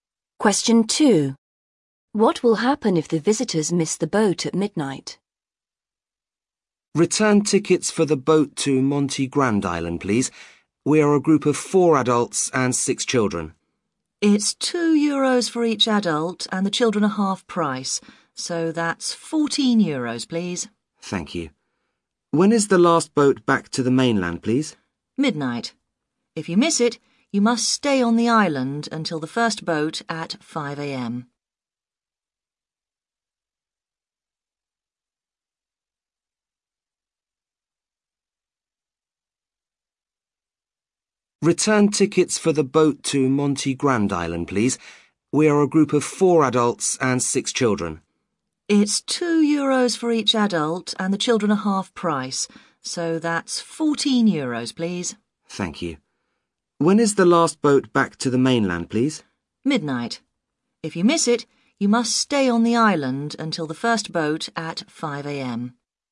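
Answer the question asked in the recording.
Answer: They must stay on the island until the first boat at 5 a.m.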